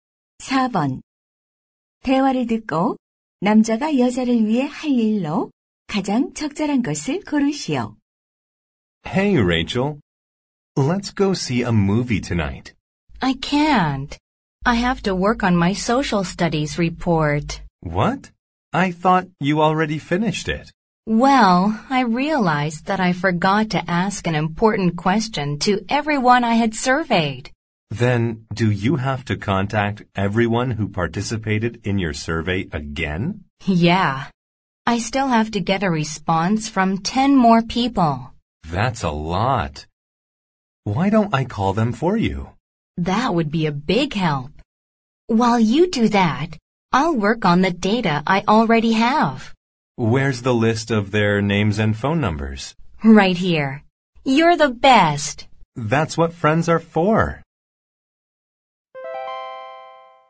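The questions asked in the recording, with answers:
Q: 대화를 듣고 남자가 여자를 위해 할 일로 가장 적절한 것을 고르시오.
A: 설문 참가자들에게 전화하기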